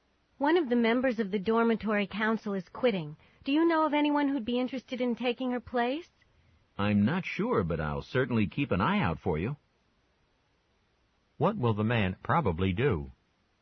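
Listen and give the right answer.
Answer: Look for someone to replace the council member who is quitting.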